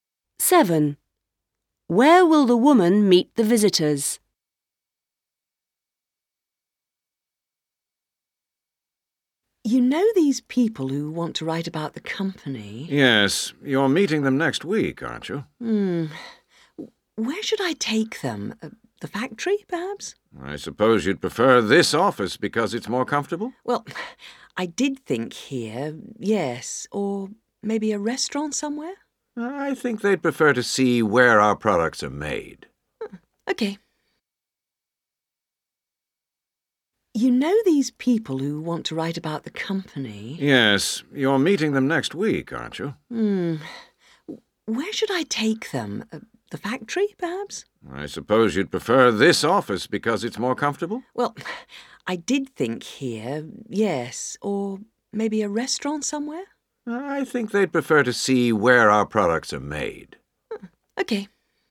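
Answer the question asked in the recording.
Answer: At the factory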